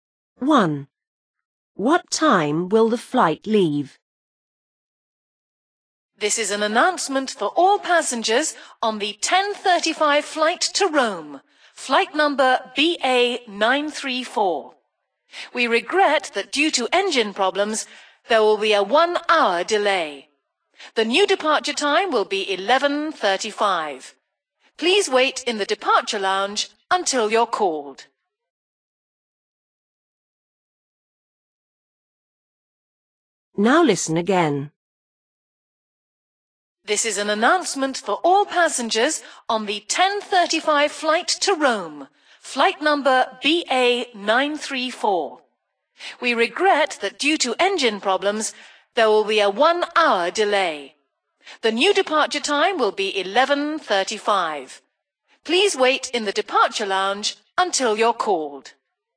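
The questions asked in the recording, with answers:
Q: What time will the flight leave?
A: 11:35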